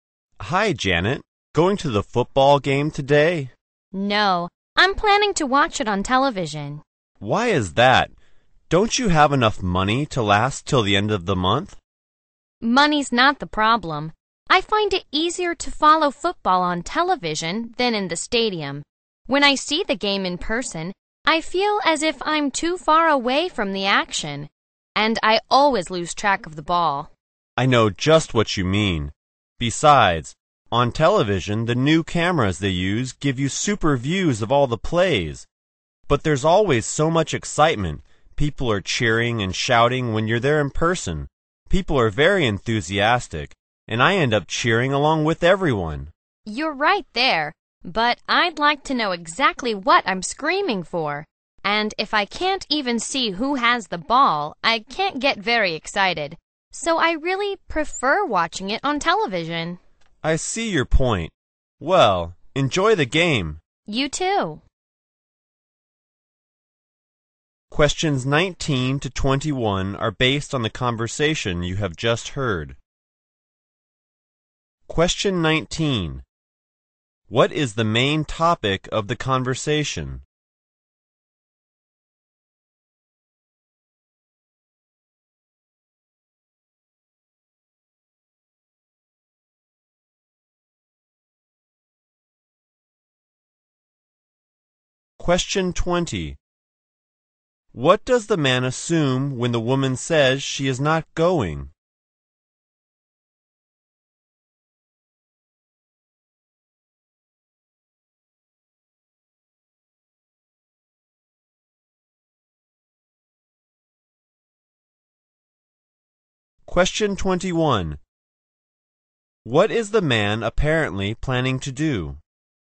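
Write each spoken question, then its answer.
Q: What is the main topic of the conversation?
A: Whether it is better to watch football on television or at the stadium

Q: What does the man assume when the woman says she is not going?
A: That she doesn't have enough money

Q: What is the man apparently planning to do?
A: Go to the football game at the stadium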